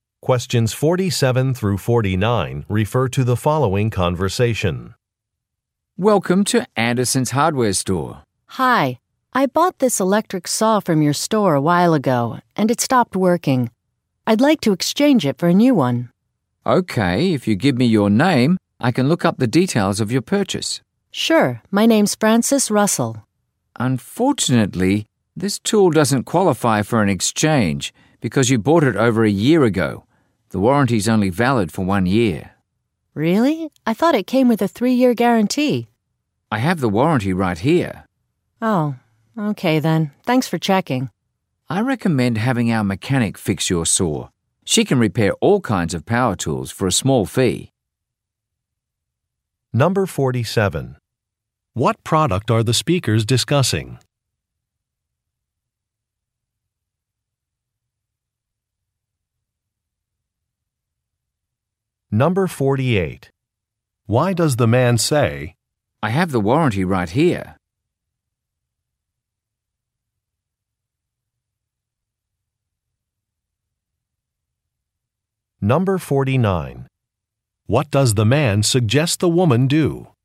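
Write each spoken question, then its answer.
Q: What product are the speakers discussing?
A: An electric saw

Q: What does the man suggest the woman do?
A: Have the store's mechanic repair the saw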